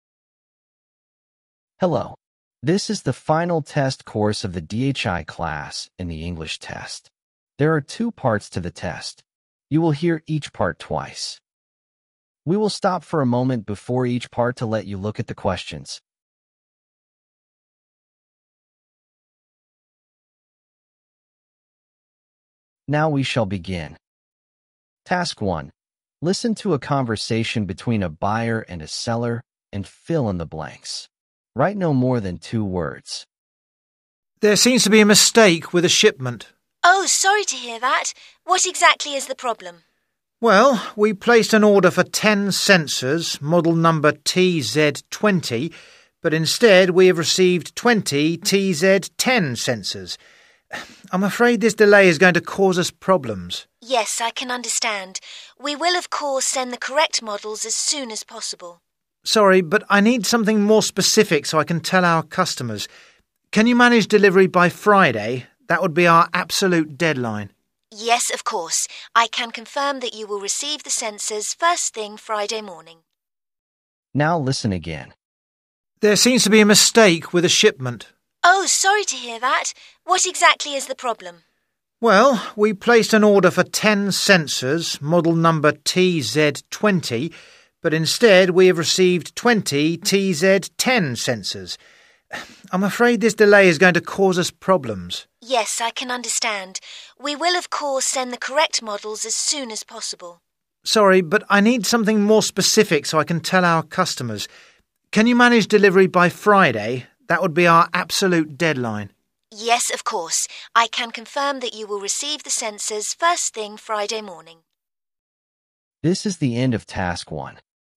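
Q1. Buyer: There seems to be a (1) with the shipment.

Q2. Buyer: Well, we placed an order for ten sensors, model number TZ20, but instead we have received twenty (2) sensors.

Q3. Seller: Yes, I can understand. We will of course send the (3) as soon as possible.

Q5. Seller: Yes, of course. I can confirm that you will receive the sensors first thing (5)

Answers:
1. mistake
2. TZ10
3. correct models
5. Friday morning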